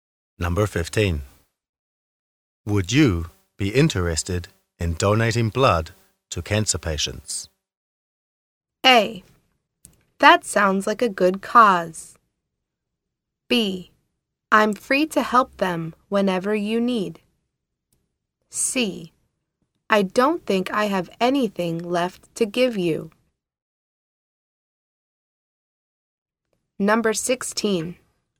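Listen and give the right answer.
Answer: A: That sounds like a good cause.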